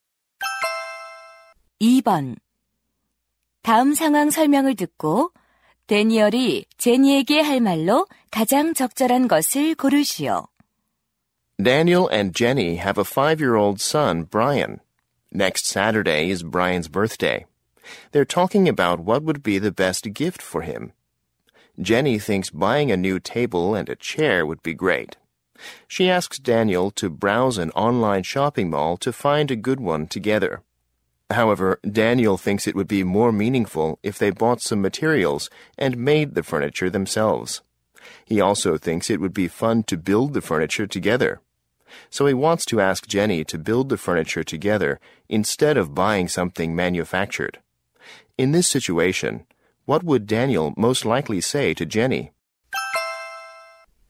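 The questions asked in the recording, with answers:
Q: In this situation, what would Daniel most likely say to Jenny?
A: Why don't we build the furniture together ourselves?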